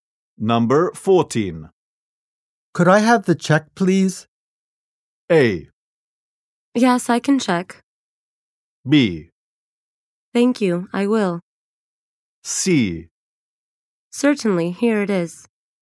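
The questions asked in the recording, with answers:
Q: Could I have the check, please?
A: C: Certainly, here it is.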